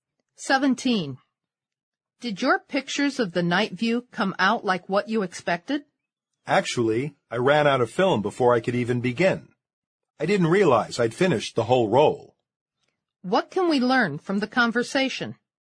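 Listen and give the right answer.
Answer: The speaker ran out of film, so he took no night view pictures.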